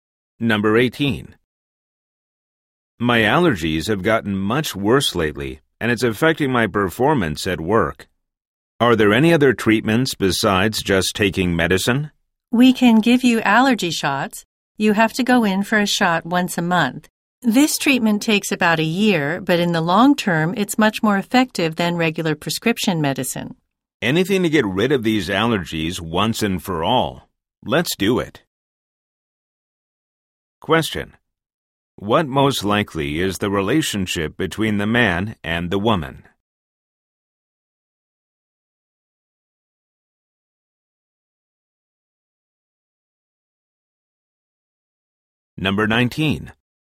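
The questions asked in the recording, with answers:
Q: What most likely is the relationship between the man and the woman?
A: Doctor and patient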